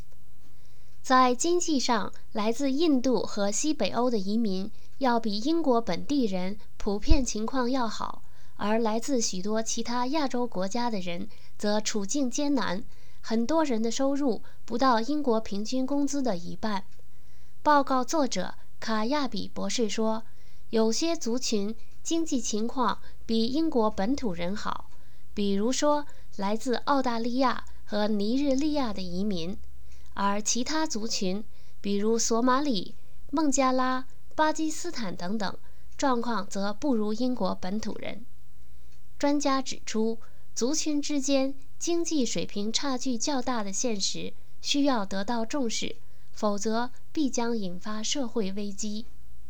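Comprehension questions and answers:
Please answer the following questions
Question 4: 专家认为族群之间经济水平差距较大有什么危险?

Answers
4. 必将引发社会危机

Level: 3rd Year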